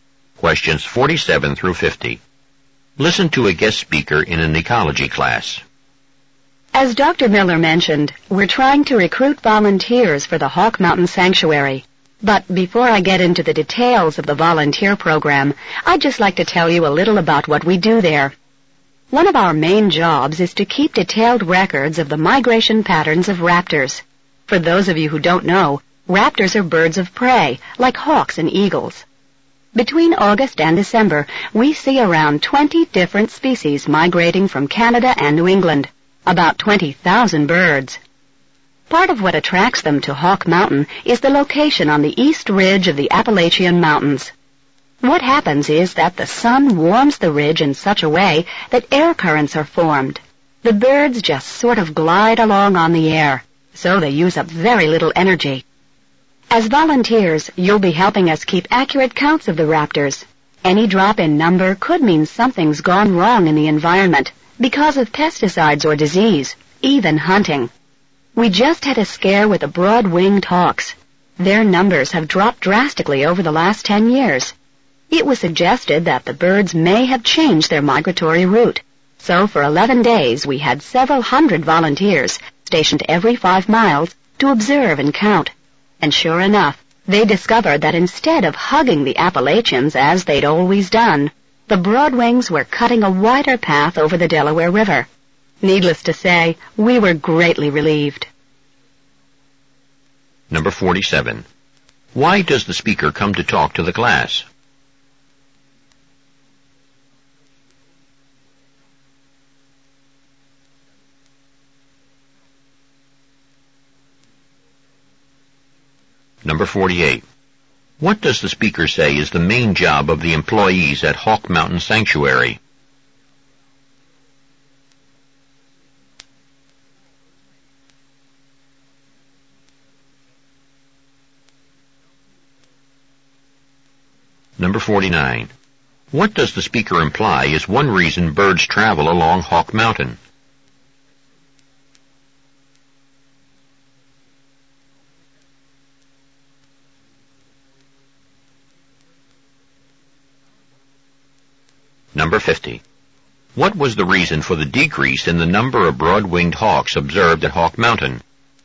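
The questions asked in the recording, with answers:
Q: Why does the speaker come to talk to the class?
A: To recruit volunteers for the Hawk Mountain Sanctuary

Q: What does the speaker say is the main job of the employees at Hawk Mountain Sanctuary?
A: Keeping detailed records of raptor migration patterns

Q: What does the speaker imply is one reason birds travel along Hawk Mountain?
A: Air currents from the sun-warmed ridge let them glide using little energy

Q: What was the reason for the decrease in the number of broad-winged hawks observed at Hawk Mountain?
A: They changed their migration route, flying over the Delaware River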